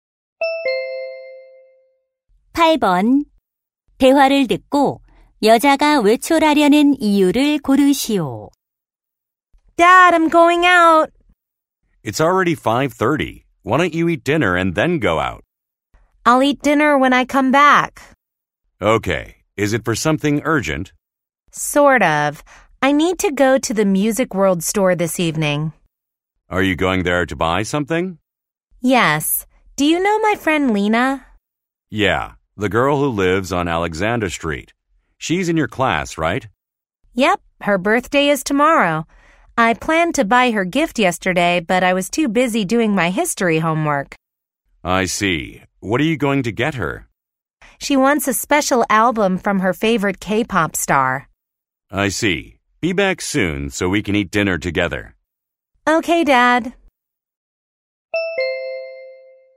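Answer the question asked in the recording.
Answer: 친구 생일 선물(앨범)을 사기 위해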